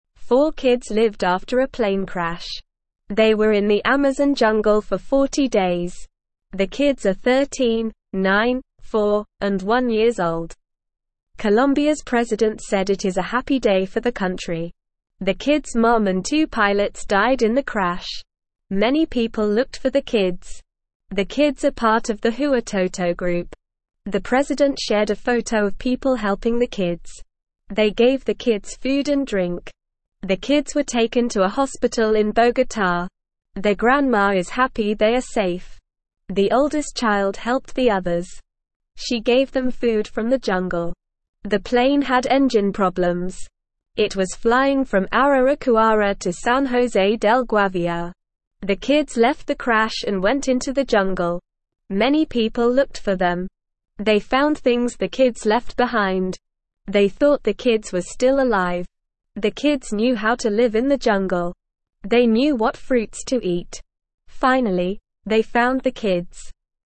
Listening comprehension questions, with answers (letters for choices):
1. Four kids lived after a (1)________ crash.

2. They gave the kids (2)________ and drink.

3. The plane had (3)________ problems.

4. They found things the kids left (4)________.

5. They knew what (5)________ to eat.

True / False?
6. Four kids lived after a plane crash.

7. The kids were in the Amazon jungle for 10 days.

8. The kids' mom and two pilots died in the crash.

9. The kids are part of the Huitoto group.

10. The kids were taken to a hospital in New York.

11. The oldest child helped the others.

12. The plane had engine problems.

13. The kids didn't know how to live in the jungle.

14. What group are the kids part of?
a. Huitoto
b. Amazon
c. Jungle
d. Colombian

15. What did the oldest child give the others?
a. clothes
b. toys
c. food from the jungle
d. water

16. What problem did the plane have?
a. engine problems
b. broken wing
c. no fuel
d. bad weather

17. How did people know the kids were still alive?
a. they heard their voices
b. they found things the kids left behind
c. they saw them from a helicopter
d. the kids sent a message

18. How old are the kids?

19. What group are the kids a part of?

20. What did the oldest child do to help the others?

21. How did the kids know what fruits to eat in the jungle?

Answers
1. plane
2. food
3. engine
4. behind
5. fruits
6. True
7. False
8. True
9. True
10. False
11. True
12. True
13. False
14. a
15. c
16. a
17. b
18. The kids are 13, nine, four, and one years old.
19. The kids are part of the Huitoto group.
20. The oldest child gave them food from the jungle.
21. The kids knew how to live in the jungle and what fruits to eat.

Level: Level 1